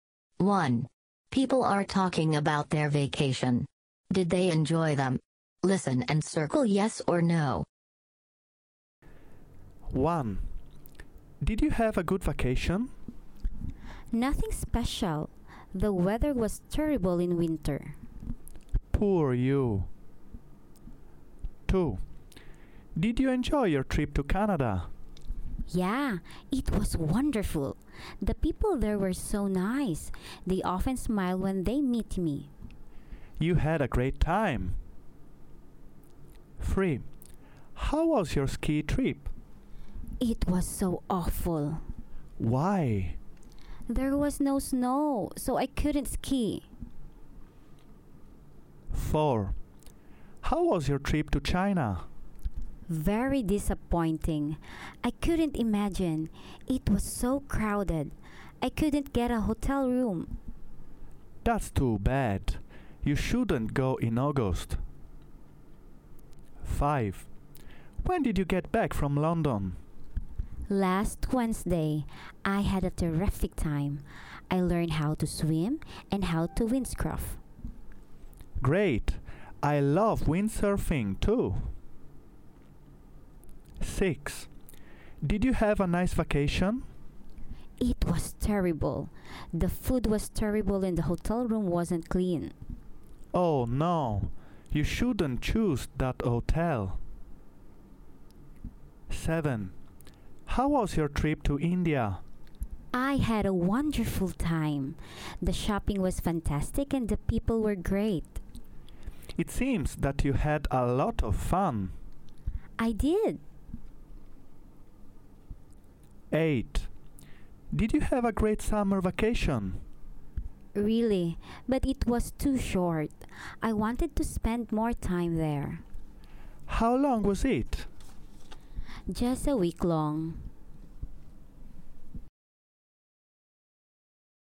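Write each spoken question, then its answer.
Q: Did you have a good vacation?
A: No

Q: Did you enjoy your trip to Canada?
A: Yes

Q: How was your ski trip?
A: No

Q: How was your trip to China?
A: No

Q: When did you get back from London?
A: Yes

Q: Did you have a nice vacation?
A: No

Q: How was your trip to India?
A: Yes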